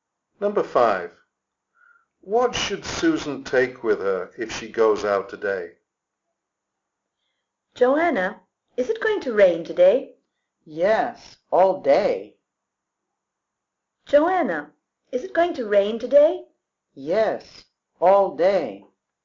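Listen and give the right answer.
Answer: an umbrella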